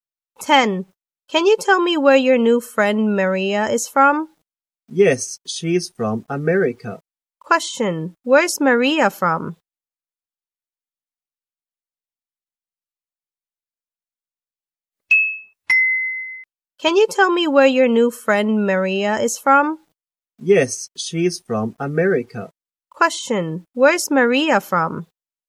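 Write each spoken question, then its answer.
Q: where's Maria from?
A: America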